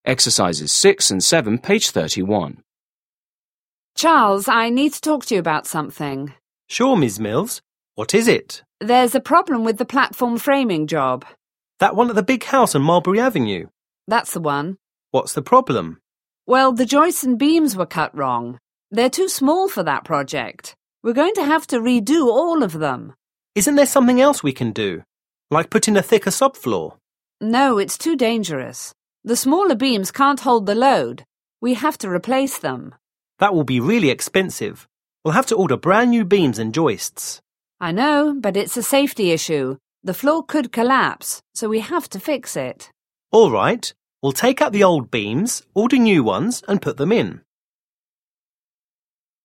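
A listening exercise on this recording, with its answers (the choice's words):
6. Listen to a conversation between an employee and a supervisor. Choose the correct answers.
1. What problem do the speakers discuss?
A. the floor collapsed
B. the subfloor is too thin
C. the joist connections broke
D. the beams and joists are too small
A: the beams and joists are too small

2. What does the man suggest?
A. returning the old parts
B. building a new support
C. putting in a thicker subfloor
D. ordering new beams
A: putting in a thicker subfloor

7. Listen again and complete the conversation.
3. Supervisor: Well, the joists and beams were 1___________.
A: cut wrong

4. They're 2___________that project.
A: too small for

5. Like 3_________ ___________ __________thicker subfloor?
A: put in a

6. The smaller beams can't 4_______ _______ __________ .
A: hold the load

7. Well have to order brand new 5 ______ __________ _____________.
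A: beams and joists

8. So we 6_____ ______________ ______________it.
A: have to fix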